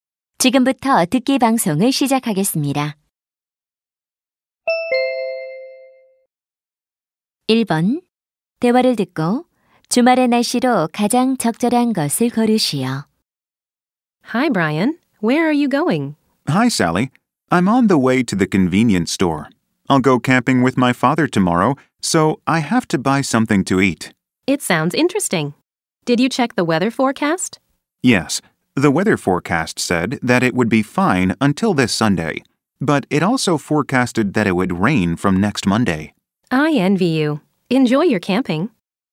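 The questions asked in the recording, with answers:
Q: 대화를 듣고 주말의 날씨로 가장 적절한 것을 고르시오.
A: 맑음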